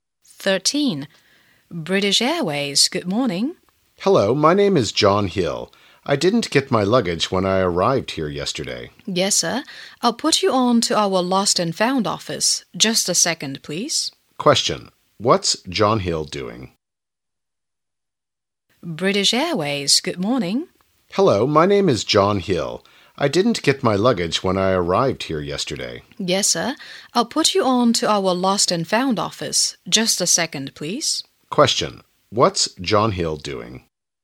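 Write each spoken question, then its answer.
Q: What's John Hill doing?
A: Reporting his lost luggage to the airline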